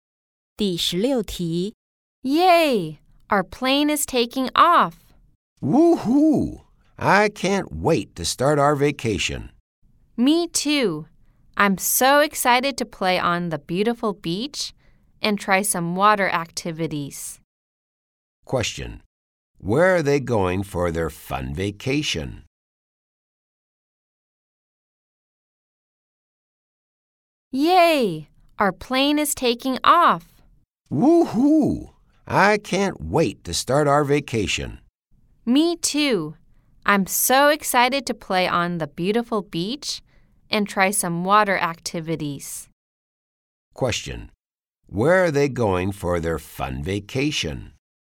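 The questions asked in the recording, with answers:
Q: Question: Where are they going for their fun vacation?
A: To a place with a beautiful beach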